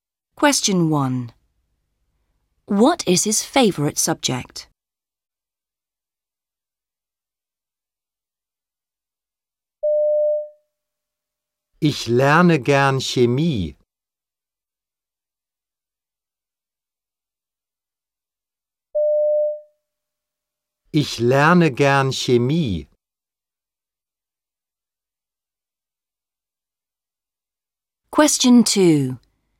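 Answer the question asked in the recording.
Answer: Chemistry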